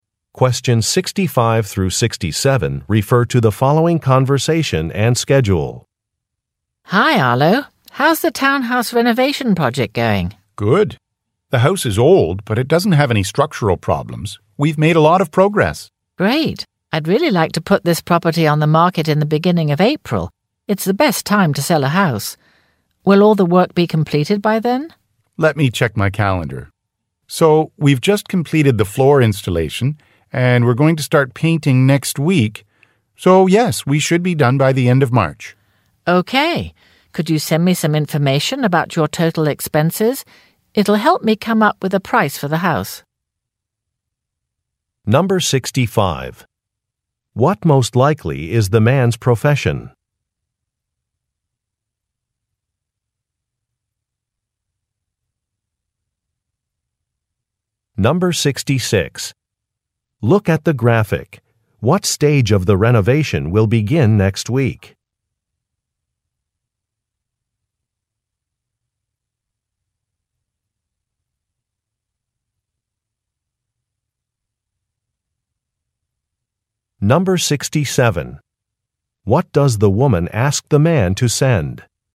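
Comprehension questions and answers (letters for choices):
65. What most likely is the man's profession?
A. Landscape architect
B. Construction manager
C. Plumber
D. Hardware store owner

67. What does the woman ask the man to send?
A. An invitation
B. A list of costs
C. Some photos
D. A Web site address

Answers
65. B
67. B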